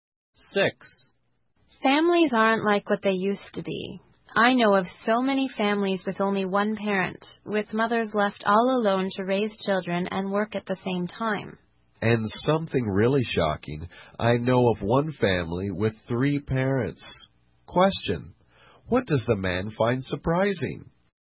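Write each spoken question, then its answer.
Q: What does the man find surprising?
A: A family with 3 parents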